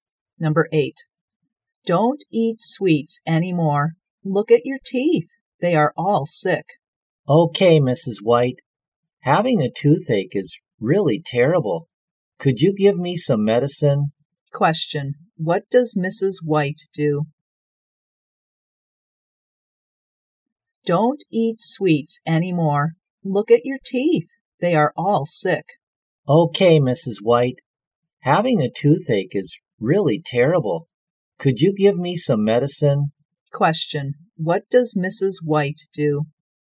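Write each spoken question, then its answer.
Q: What does Mrs. White do?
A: She is a dentist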